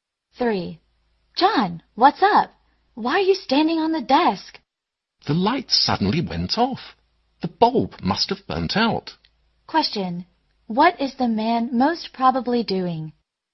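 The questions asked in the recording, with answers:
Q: what is the man most probably doing?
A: Changing a light bulb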